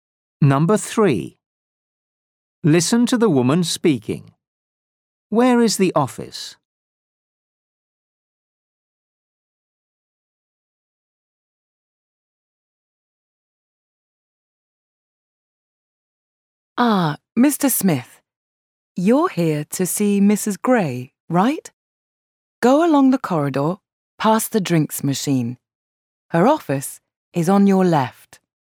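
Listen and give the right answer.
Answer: along the corridor, past the drinks machine, on the left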